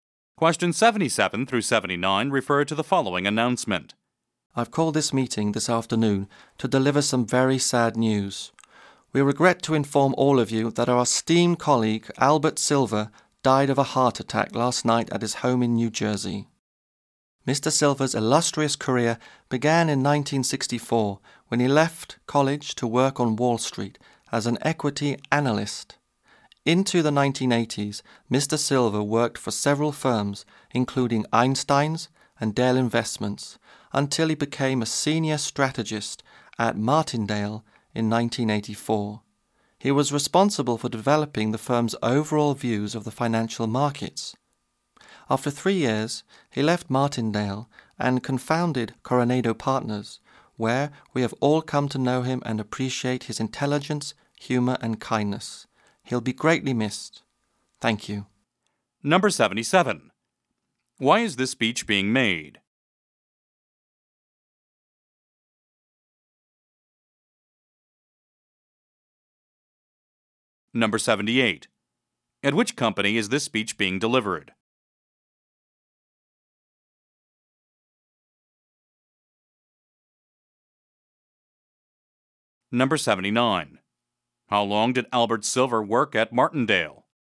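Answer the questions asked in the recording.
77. To announce a colleague's death
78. Coronado Partners
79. 3 years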